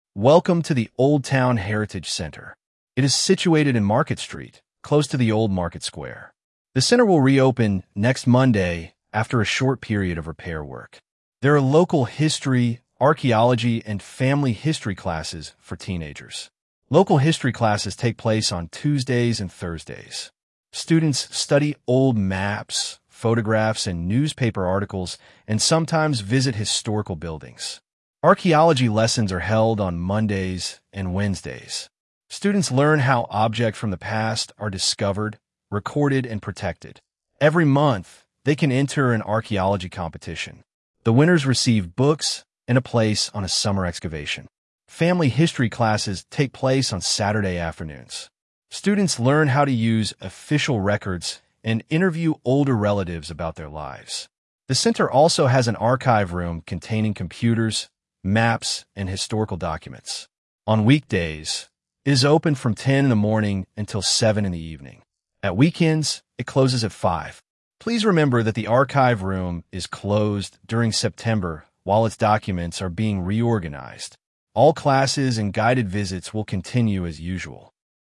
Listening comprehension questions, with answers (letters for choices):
Вы услышите сообщение. Для каждого предложения A–E выберите один правильный вариант ответа из трёх предложенных: 1, 2 или 3. Вы услышите запись дважды. При повторном прослушивании проверьте себя.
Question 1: Choose the TRUE sentence.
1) The heritage centre is inside the town library.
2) The heritage centre is opposite the railway station.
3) The heritage centre is near the old market square.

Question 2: Local history classes take place...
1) on Mondays and Wednesdays.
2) on Tuesdays and Thursdays.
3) on Saturday afternoons.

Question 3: Students can enter a monthly competition connected with...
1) archaeology.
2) local history.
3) family history.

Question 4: On weekdays the archive room closes at...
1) 6 p.m.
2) 7 p.m.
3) 8 p.m.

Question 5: During September students cannot...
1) attend archaeology classes.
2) use the archive room.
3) join local history lessons.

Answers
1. 3
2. 2
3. 1
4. 2
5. 2

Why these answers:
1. Историко-краеведческий центр находится на Маркет-стрит рядом со старой рыночной площадью.
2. Занятия по местной истории проходят по вторникам и четвергам.
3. Каждый месяц учащиеся могут участвовать в конкурсе по археологии.
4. В будние дни архивная комната работает до семи часов вечера.
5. В сентябре архивная комната закрыта, поскольку находящиеся в ней документы реорганизуют.

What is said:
Welcome to the Old Town Heritage Centre. It is situated in Market Street, close to the old market square. The centre will reopen next Monday after a short period of repair work.
There are local history, archaeology and family history classes for teenagers. Local history classes take place on Tuesdays and Thursdays. Students study old maps, photographs and newspaper articles and sometimes visit historical buildings.
Archaeology lessons are held on Mondays and Wednesdays. Students learn how objects from the past are discovered, recorded and protected. Every month, they can enter an archaeology competition. The winners receive books and a place on a summer excavation.
Students learn how to use official records and interview older relatives about their lives.
The centre also has an archive room containing computers, maps and historical documents. On weekdays, it is open from ten in the morning until seven in the evening. At weekends, it closes at five.
Please remember that the archive room is closed during September while its documents are being reorganised. All classes and guided visits will continue as usual.

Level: 8 класса